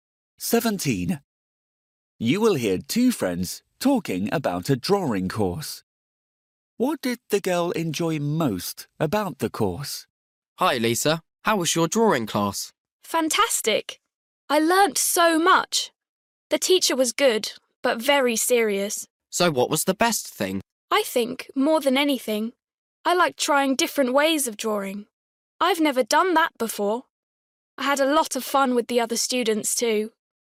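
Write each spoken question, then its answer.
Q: What did the girl enjoy most about the course?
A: Trying different ways of drawing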